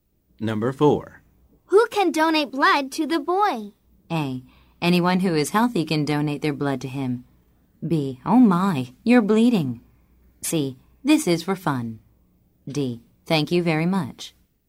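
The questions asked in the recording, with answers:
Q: Who can donate blood to the boy?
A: A: Anyone who is healthy can donate their blood to him.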